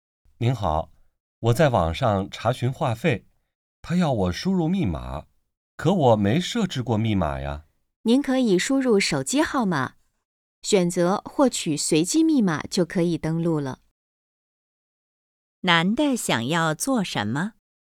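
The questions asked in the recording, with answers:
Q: 男的想要做什么?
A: 在网上查询话费(登录)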